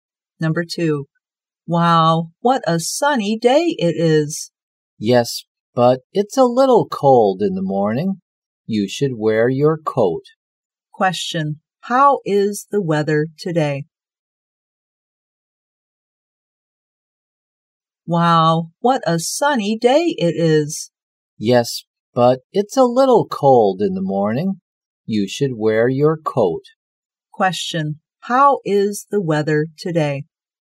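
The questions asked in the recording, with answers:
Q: Question, how is the weather today?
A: Sunny but a little cold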